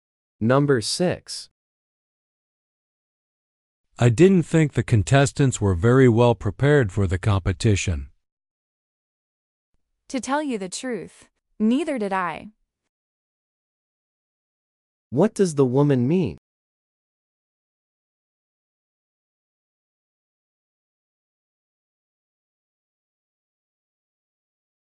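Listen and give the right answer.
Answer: She agrees that the contestants weren't well prepared.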